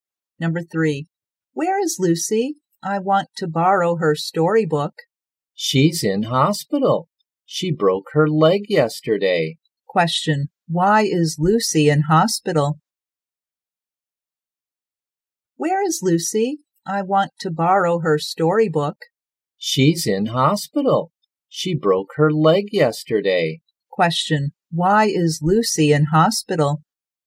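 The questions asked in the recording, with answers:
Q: Question, why is Lucy in hospital?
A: She broke her leg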